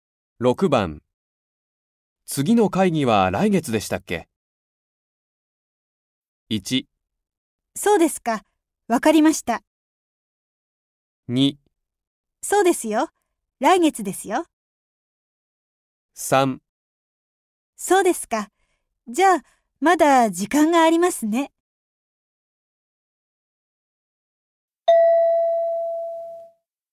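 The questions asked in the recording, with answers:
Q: 次の会議は来月でしたっけ?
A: 2: そうですよ。来月ですよ。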